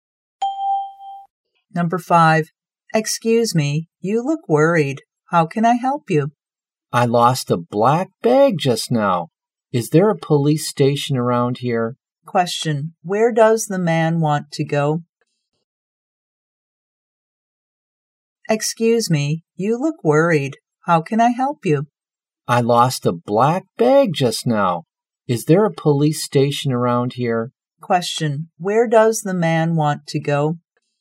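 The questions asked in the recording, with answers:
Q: Where does the man want to go?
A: To a police station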